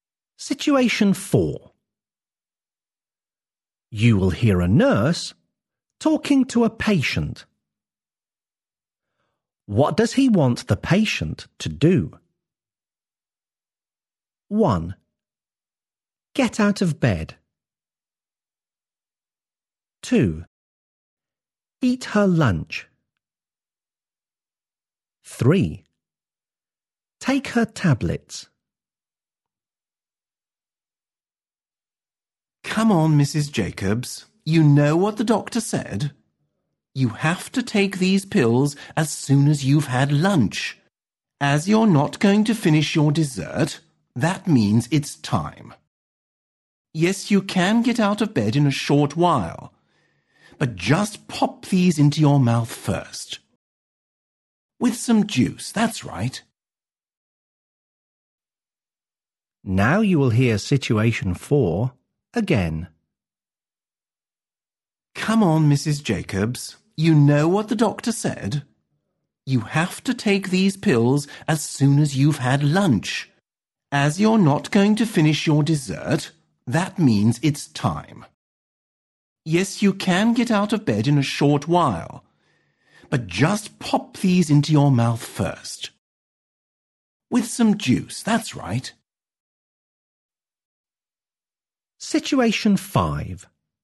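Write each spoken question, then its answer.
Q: What does he want the patient to do?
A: 3: Take her tablets.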